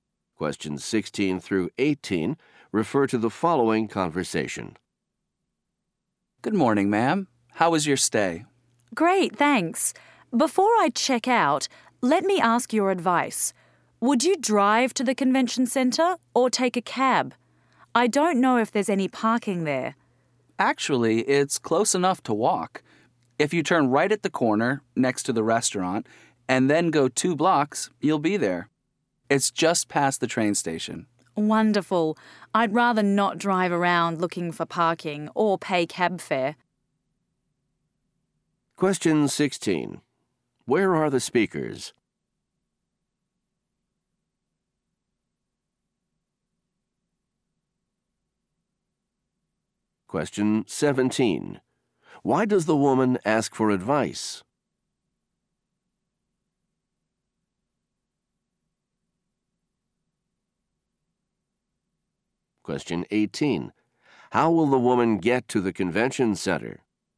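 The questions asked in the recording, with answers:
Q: Where are the speakers?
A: At a hotel

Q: Why does the woman ask for advice?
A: She doesn't know if there's parking at the convention center

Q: How will the woman get to the convention center?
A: She will walk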